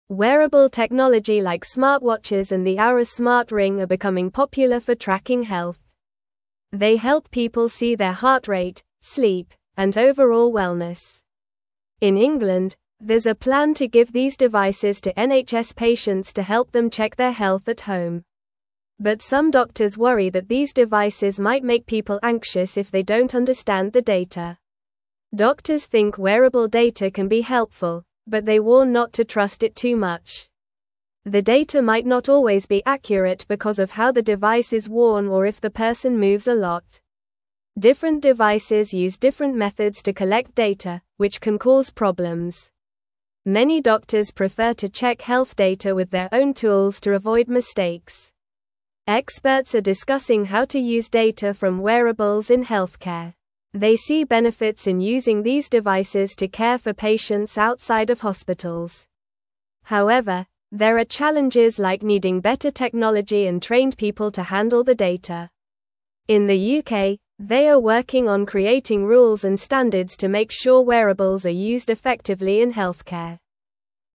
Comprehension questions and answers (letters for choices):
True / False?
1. Doctors believe wearable data can be useful, but it may not always be correct.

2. Different devices collect health data in different ways, which can cause problems.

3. The UK is not trying to create rules to use wearables safely and effectively in healthcare.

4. These devices help people track their heart rate, sleep, and health.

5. Some doctors are worried that people might feel anxious about the data from these devices.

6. Experts are not discussing how to use data from wearables in healthcare.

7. In England, there is no plan to provide wearable devices to NHS patients.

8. Wearable technology excludes devices like smartwatches and the Oura smart ring.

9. What do smartwatches and the Oura smart ring help people track?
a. Weather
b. Time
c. Distance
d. Health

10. Who is planning to give wearable devices to patients in England?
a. Schools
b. Companies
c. NHS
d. Families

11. Why do some doctors worry about wearable devices?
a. They are too expensive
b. They are too heavy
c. They are too small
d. They might make people anxious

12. What do doctors think about trusting wearable data?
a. They think it is always correct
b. They say it is not useful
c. They warn not to trust it too much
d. They believe it is perfect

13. What can cause problems with the data from wearables?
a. The color of the device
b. How the device is worn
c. The brand of the device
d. The price of the device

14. What do many doctors prefer to use to check health data?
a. Their own tools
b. Only wearable devices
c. Computers only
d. Phones only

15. What are experts discussing about wearables in healthcare?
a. How to use the data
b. How to sell them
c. How to break them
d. How to hide them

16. What is the UK working on for wearable devices in healthcare?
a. Making them more colorful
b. Creating rules and standards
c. Reducing their size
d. Making them cheaper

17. Wearable technology like smartwatches and the (1)______ smart ring are (2)______ popular for tracking health.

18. Wearable technology like smartwatches and the (1)______ smart ring are (2)______ popular for tracking health.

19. In England, there's a (3)______ to give these devices to NHS patients to help them check their health at home.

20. But some doctors worry that these devices might make people anxious if they don't (4)______ the data.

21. Doctors (5)______ wearable data can be helpful, but they warn not to (6)______ it too much.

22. Doctors (5)______ wearable data can be helpful, but they warn not to (6)______ it too much.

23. Different devices use (7)______ methods to collect data, which can (8)______ problems.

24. Many doctors prefer to check health data with their own tools to avoid (9)______.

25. They see benefits in using these devices to (10)______ for patients outside of hospitals.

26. However, there are challenges like needing (11)______ technology and trained people to handle the (12)______.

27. However, there are challenges like needing (11)______ technology and trained people to handle the (12)______.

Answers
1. True
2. True
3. False
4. True
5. True
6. False
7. False
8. False
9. d
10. c
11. d
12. c
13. b
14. a
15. a
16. b
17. Oura
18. becoming
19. plan
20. understand
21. think
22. trust
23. cause
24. mistakes
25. care
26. better
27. data

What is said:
Wearable technology like smartwatches and the Oura smart ring are becoming popular for tracking health. They help people see their heart rate, sleep, and overall wellness. In England, there's a plan to give these devices to NHS patients to help them check their health at home. But some doctors worry that these devices might make people anxious if they don't understand the data.
Doctors think wearable data can be helpful, but they warn not to trust it too much. The data might not always be accurate because of how the device is worn or if the person moves a lot. Different devices use different methods to collect data, which can cause problems. Many doctors prefer to check health data with their own tools to avoid mistakes.
Experts are discussing how to use data from wearables in healthcare. They see benefits in using these devices to care for patients outside of hospitals. However, there are challenges like needing better technology and trained people to handle the data. In the UK, they are working on creating rules and standards to make sure wearables are used effectively in healthcare.

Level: Level 2